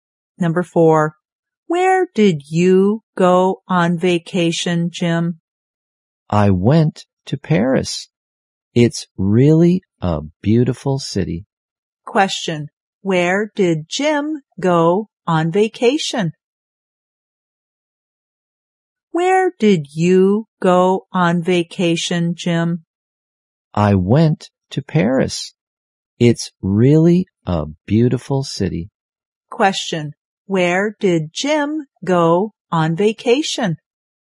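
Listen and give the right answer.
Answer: Paris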